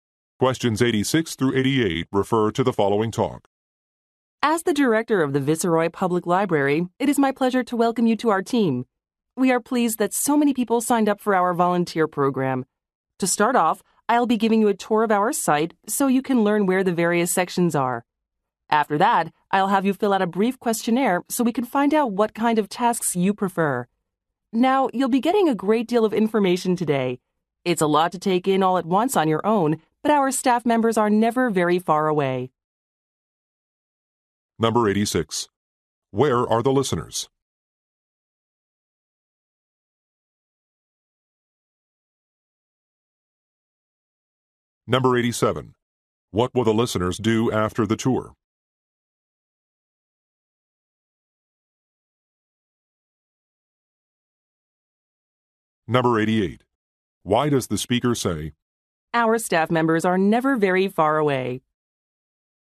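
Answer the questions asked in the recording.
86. At a public library
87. Fill out a questionnaire
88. To encourage them to ask staff for help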